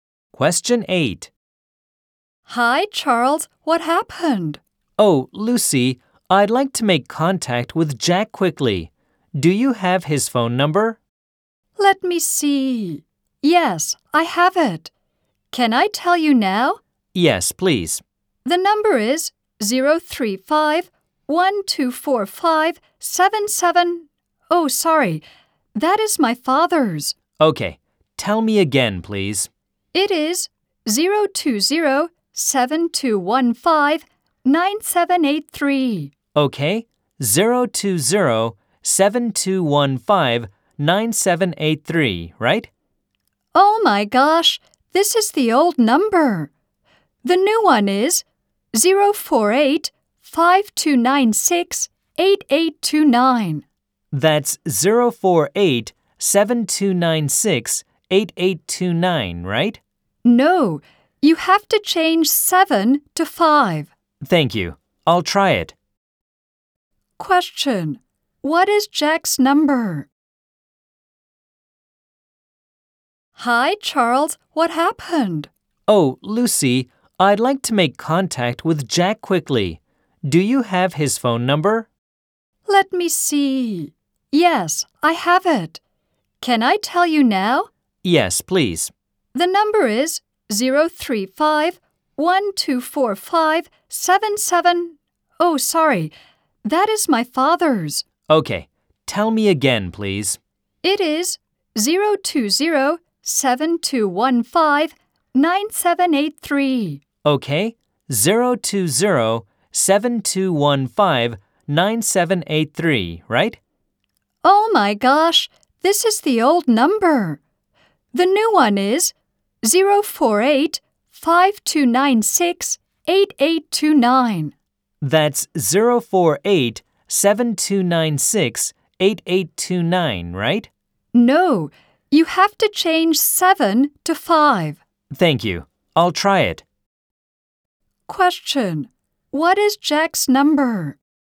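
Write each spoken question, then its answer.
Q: What is Jack's number?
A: 048-5296-8829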